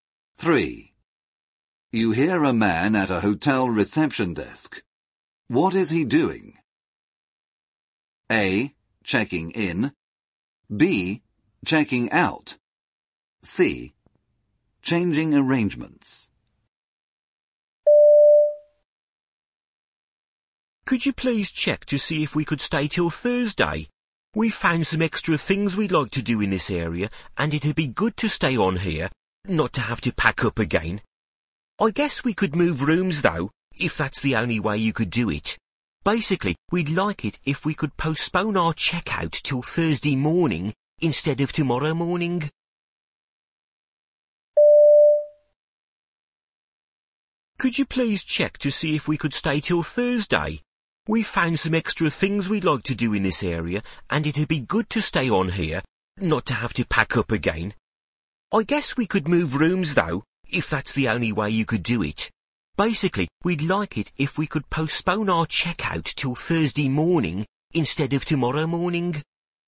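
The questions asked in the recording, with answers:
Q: What is he doing?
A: C: Changing arrangements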